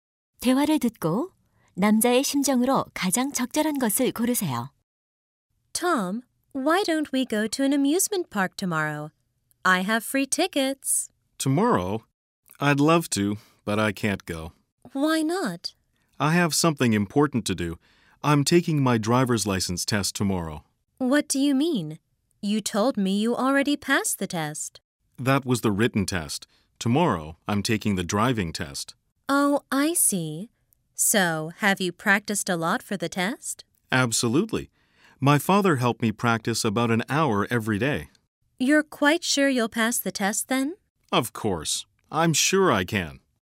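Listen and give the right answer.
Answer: 자신감 있음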